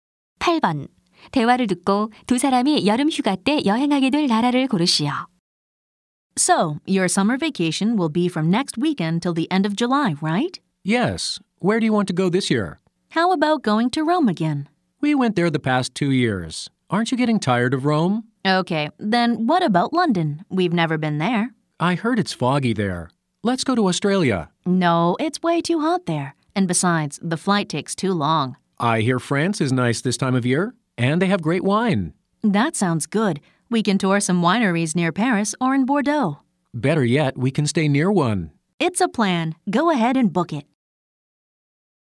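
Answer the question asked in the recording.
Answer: 프랑스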